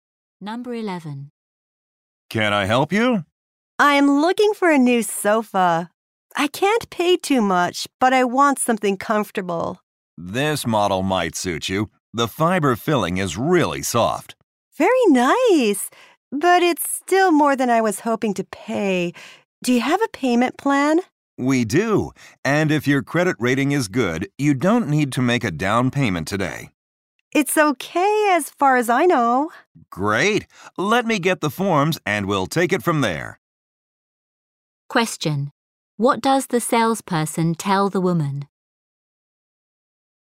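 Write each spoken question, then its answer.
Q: What does the salesperson tell the woman?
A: If her credit rating is good, she doesn't need to make a down payment today.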